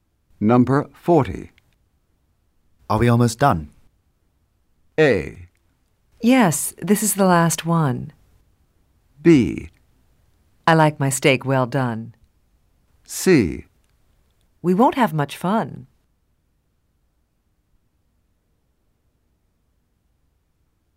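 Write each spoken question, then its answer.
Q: Are we almost done?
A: A: Yes, this is the last one.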